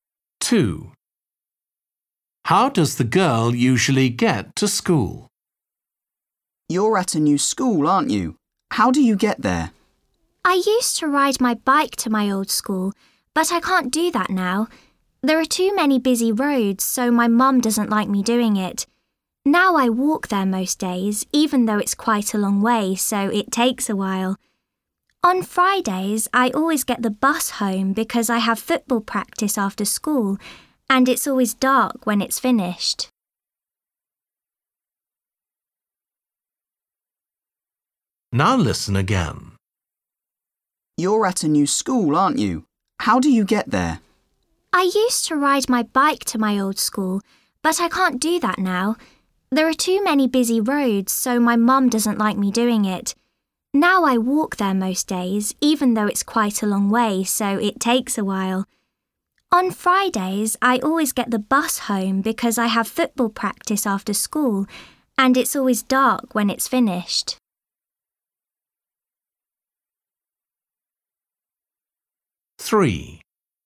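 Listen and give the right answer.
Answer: she walks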